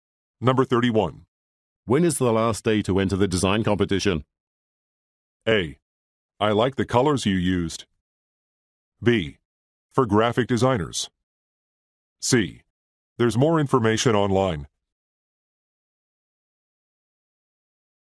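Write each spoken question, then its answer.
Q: When is the last day to enter the design competition?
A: C: There's more information online.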